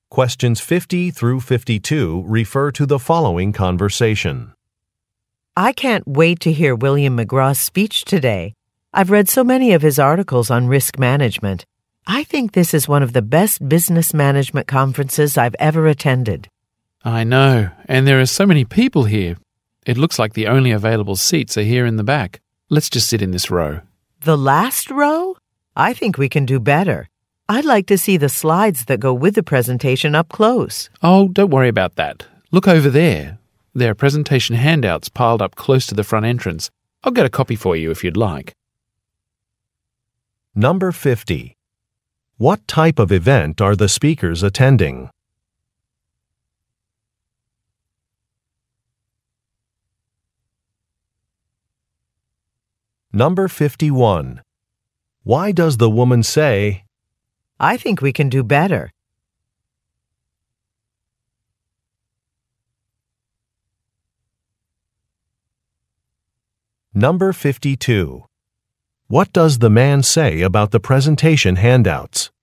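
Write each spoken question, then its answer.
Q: What type of event are the speakers attending?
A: A business management conference

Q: Why does the woman say, I think we can do better?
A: She wants to find seats closer to the front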